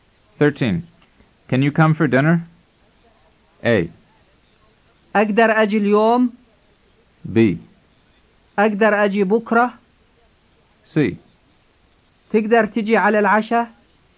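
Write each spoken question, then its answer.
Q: Can you come for dinner?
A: C: تقدر تجي على العشاء؟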